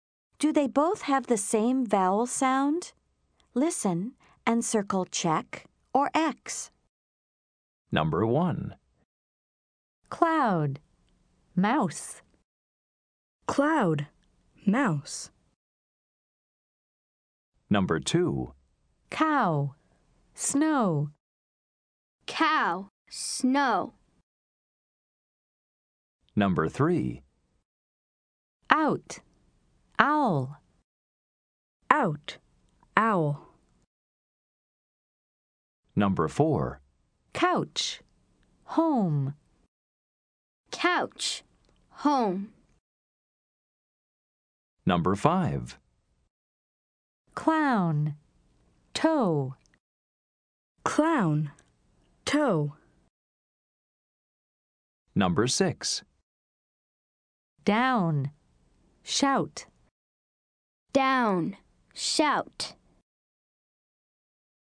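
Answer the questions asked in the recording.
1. Yes, same vowel sound
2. No, different vowel sounds
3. Yes, same vowel sound
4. No, different vowel sounds
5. No, different vowel sounds
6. Yes, same vowel sound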